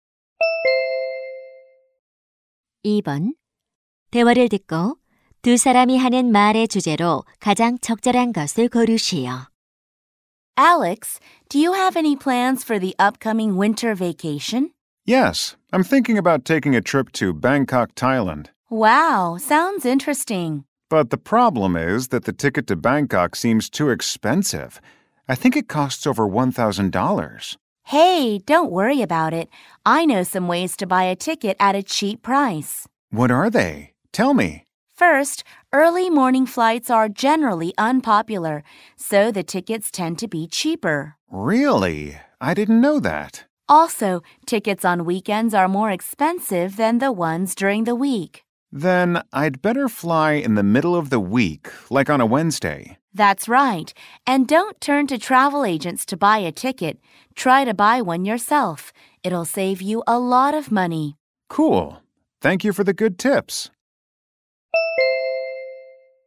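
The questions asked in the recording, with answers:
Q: 대화를 듣고 두 사람이 하는 말의 주제로 가장 적절한 것을 고르시오.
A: 항공권을 싸게 사는 방법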